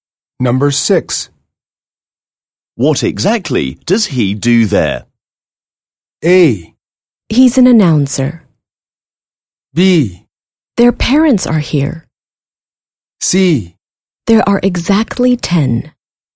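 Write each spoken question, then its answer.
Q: What exactly does he do there?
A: A: He's an announcer.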